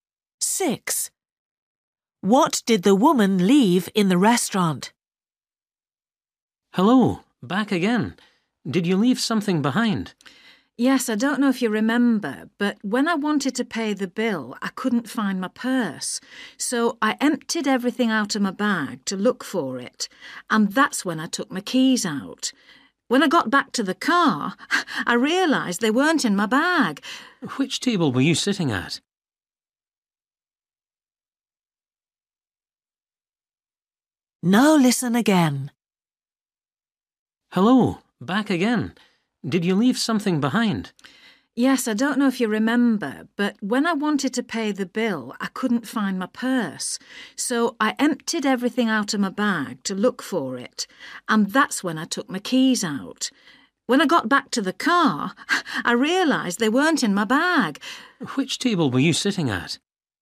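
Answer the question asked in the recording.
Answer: Her keys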